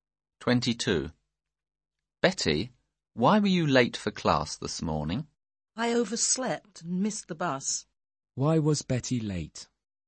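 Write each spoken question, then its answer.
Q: Why was Betty late?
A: She overslept and missed the bus.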